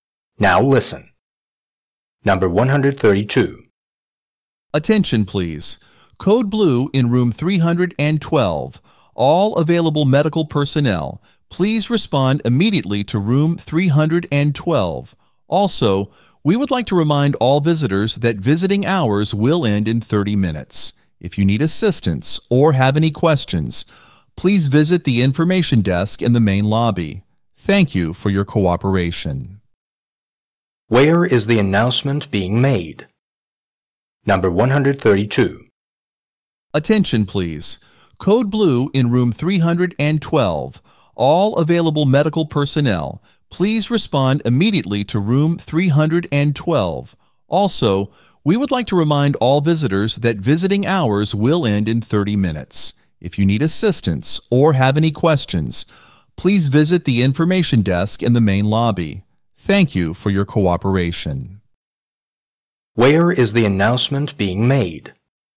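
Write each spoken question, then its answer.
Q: Where is the announcement being made?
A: In a hospital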